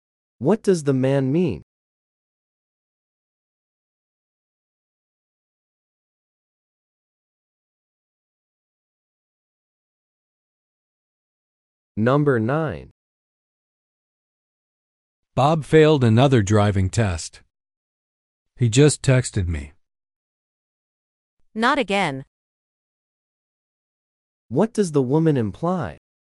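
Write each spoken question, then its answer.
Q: What does the woman imply?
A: Bob has failed the test before.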